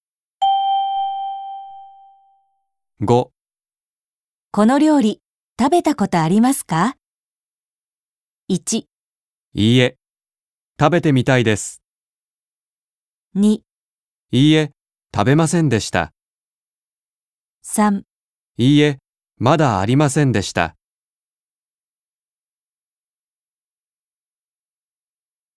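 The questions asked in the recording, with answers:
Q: この料理、食べたことありますか?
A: 1: いいえ、食べてみたいです。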